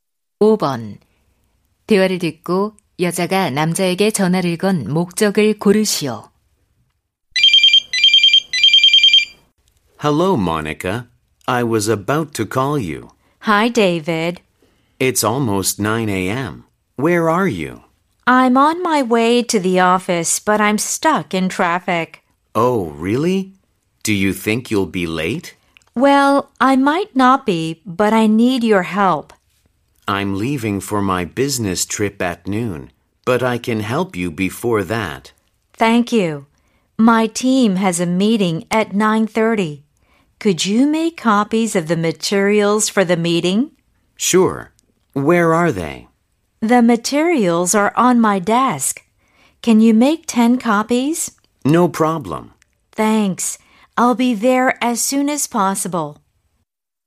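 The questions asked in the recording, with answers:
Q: 대화를 듣고 여자가 남자에게 전화를 건 목적을 고르시오.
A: 회의 자료 복사를 부탁하려고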